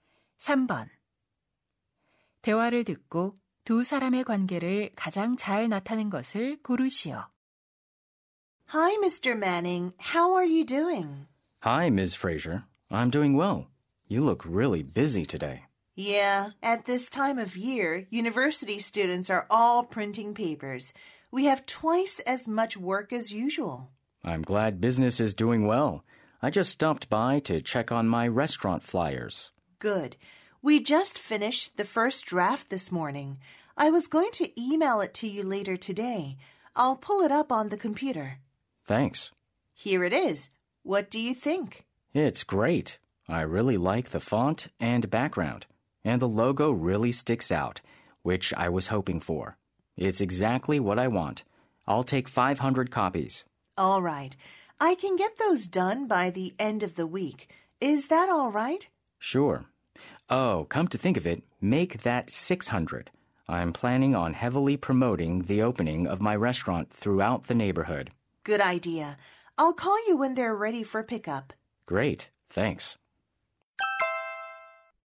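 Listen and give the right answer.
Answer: 인쇄소 주인 - 식당 주인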